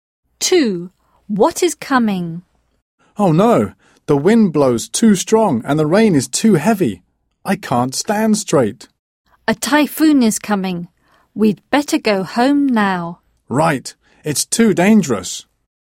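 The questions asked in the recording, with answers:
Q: What is coming?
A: A typhoon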